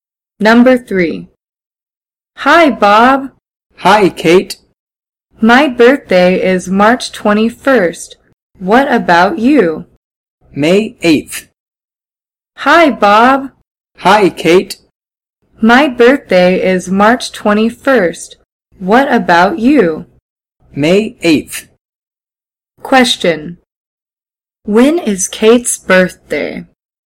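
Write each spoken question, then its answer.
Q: When is Kate's birthday?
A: March 21st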